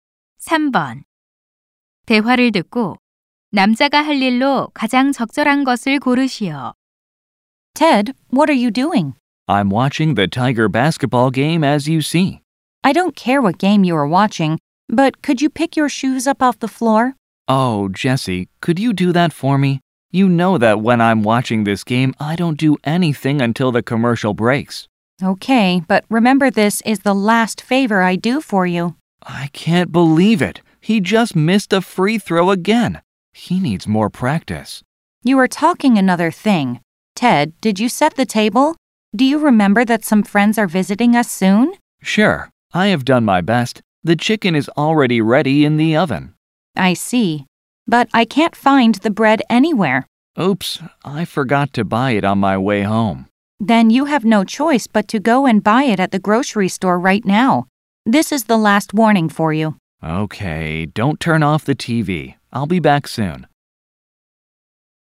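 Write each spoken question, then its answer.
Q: 대화를 듣고 남자가 할 일로 가장 적절한 것을 고르시오.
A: 식료품점에 가서 빵 사기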